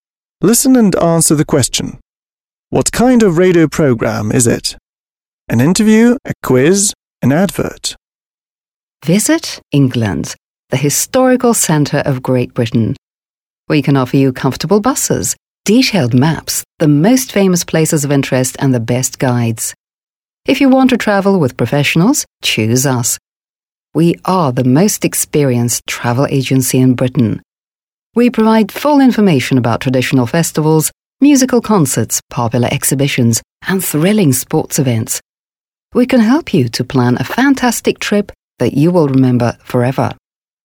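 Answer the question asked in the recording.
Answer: an advert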